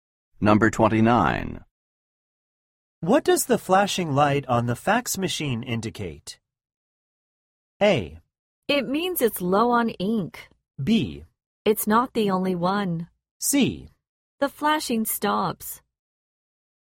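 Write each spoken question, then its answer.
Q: What does the flashing light on the fax machine indicate?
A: A: It means it's low on ink.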